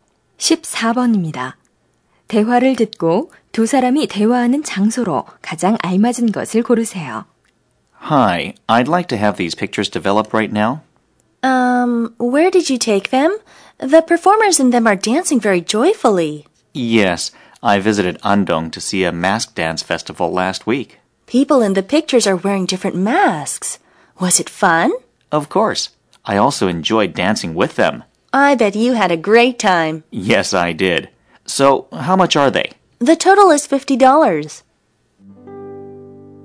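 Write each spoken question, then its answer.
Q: 대화를 듣고 두 사람이 대화하는 장소로 가장 알맞은 것을 고르세요.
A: 사진관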